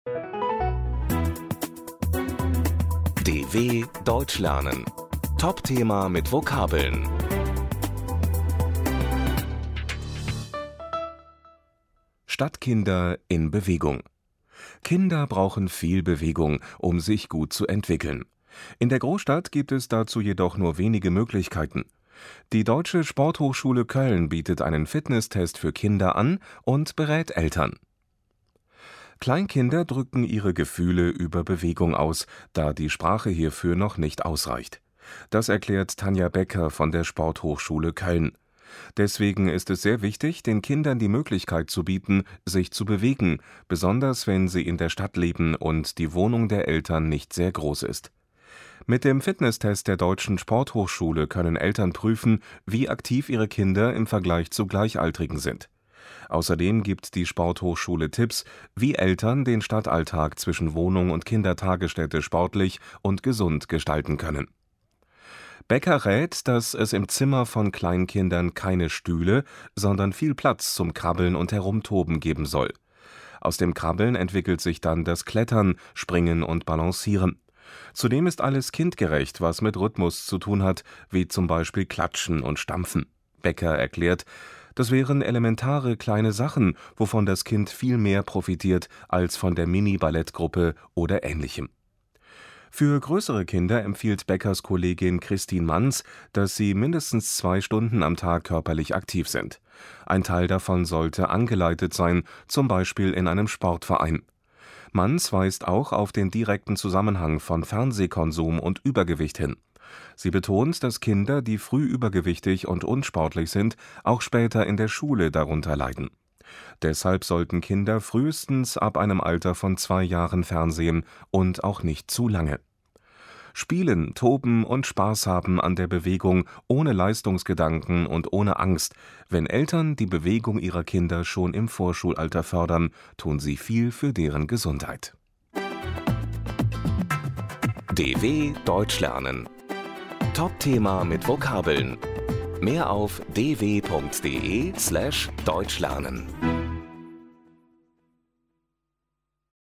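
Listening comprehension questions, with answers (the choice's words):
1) Die Deutsche Sporthochschule Köln bietet ...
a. Sportkurse für übergewichtige Eltern an.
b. einen Fitnesstest für Kinder an.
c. eine Mini-Ballettgruppe an.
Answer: einen Fitnesstest für Kinder an.

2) Tanja Becker sagt, dass es für Kleinkinder besonders wichtig ist, ...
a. angeleitet Sport zu machen – zum Beispiel in einem Sportverein.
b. regelmäßig einen Fitnesstest zu machen.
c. sich im Alltag viel bewegen zu können.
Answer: sich im Alltag viel bewegen zu können.

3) Kristin Manz empfiehlt, dass Kinder ... ab zwei Jahren fernsehen sollten.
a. frühestens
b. spätestens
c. mindestens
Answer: frühestens

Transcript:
Stadtkinder in Bewegung
Kleinkinder drücken ihre Gefühle über Bewegung aus, da die Sprache hierfür noch nicht ausreicht. Das erklärt Tanja Becker von der Sporthochschule Köln. Deswegen ist es sehr wichtig, den Kindern die Möglichkeit zu bieten, sich zu bewegen – besonders, wenn sie in der Stadt leben und die Wohnung der Eltern nicht sehr groß ist. 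Mit dem Fitnesstest der Deutschen Sporthochschule können Eltern prüfen, wie aktiv ihre Kinder im Vergleich zu Gleichaltrigen sind. Außerdem gibt die Sporthochschule Tipps, wie Eltern den Stadtalltag zwischen Wohnung und Kindertagesstätte sportlich und gesund gestalten können.
Becker rät, dass es im Zimmer von Kleinkindern keine Stühle, sondern viel Platz zum Krabbeln und Herumtoben geben soll. Aus dem Krabbeln entwickelt sich dann das Klettern, Springen und Balancieren. Zudem ist alles kindgerecht, was mit Rhythmus zu tun hat, wie zum Beispiel klatschen und stampfen. Becker erklärt: "Das wären elementare kleine Sachen, wovon das Kind viel mehr profitiert als von (...) der Mini-Ballettgruppe oder Ähnlichem."
Für größere Kinder empfiehlt Beckers Kollegin Kristin Manz, dass sie mindestens zwei Stunden am Tag körperlich aktiv sind. Ein Teil davon sollte angeleitet sein, zum Beispiel in einem Sportverein. 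Manz weist auch auf den direkten Zusammenhang von Fernsehkonsum und Übergewicht hin. Sie betont, dass Kinder, die früh übergewichtig und unsportlich sind, auch später in der Schule darunter leiden. Deshalb sollten Kinder frühestens ab einem Alter von zwei Jahren fernsehen – und auch nicht zu lange.
Spielen, toben und Spaß haben an der Bewegung ohne Leistungsgedanken und ohne Angst – wenn Eltern die Bewegung ihrer Kinder schon im Vorschulalter fördern, tun sie viel für deren Gesundheit.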